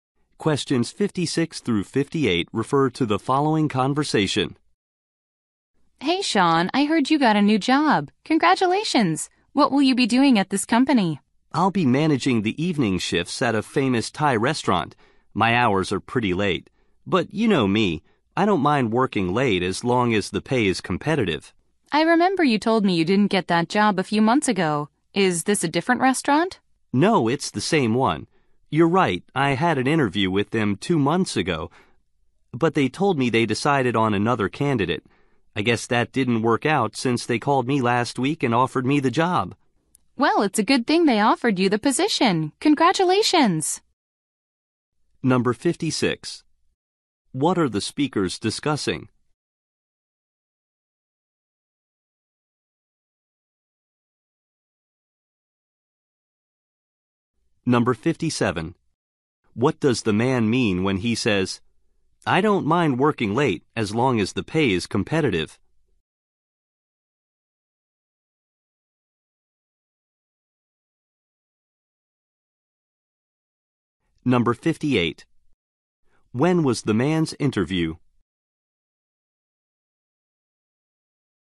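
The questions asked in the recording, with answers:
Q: What are the speakers discussing?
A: The man's new job

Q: What does the man mean when he says, "I don't mind working late as long as the pay is competitive"?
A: He is fine with late hours if paid well

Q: When was the man's interview?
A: Two months ago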